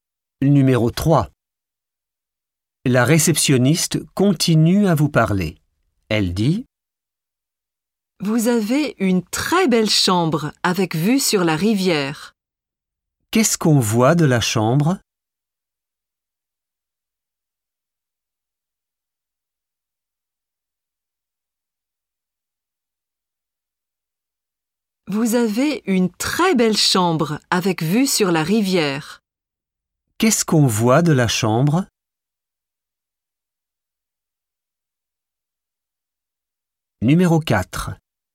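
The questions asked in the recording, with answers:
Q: Qu'est-ce qu'on voit de la chambre?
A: La rivière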